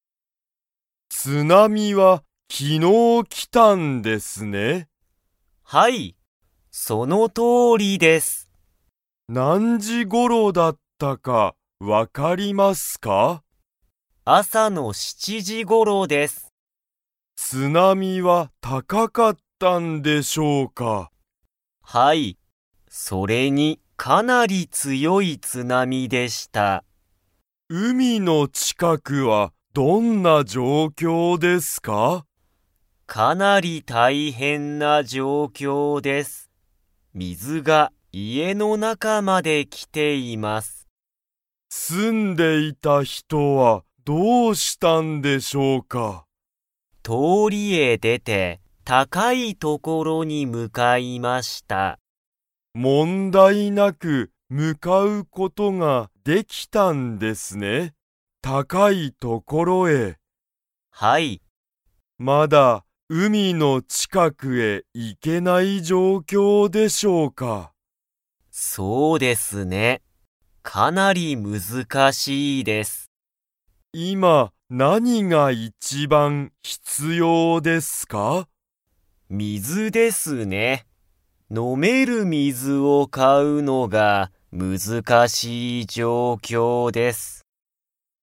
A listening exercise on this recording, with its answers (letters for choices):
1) 津波(つなみ)は夜よるに来(き)ましたか?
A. はい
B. いいえ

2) 住(す)んでいた人(ひと)は、____所(ところ)に向(む)かった。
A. 高たかい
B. 難(むずか)しい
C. 大変(たいへん)な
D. 面白おもしろい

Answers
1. B
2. A

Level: Level 2